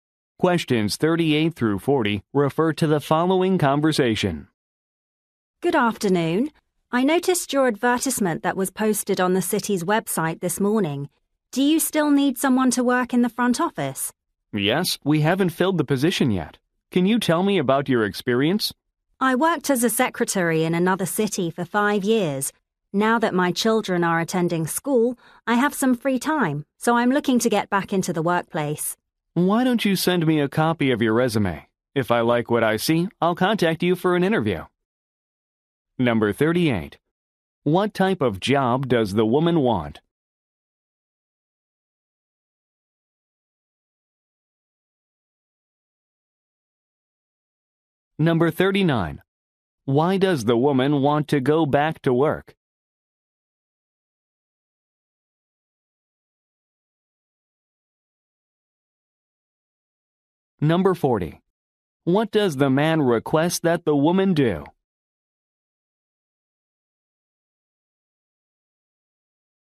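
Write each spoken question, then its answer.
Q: What type of job does the woman want?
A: An office job (secretary in the front office)

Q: Why does the woman want to go back to work?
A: Her children are in school, so she has free time

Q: What does the man request that the woman do?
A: Send a copy of her resume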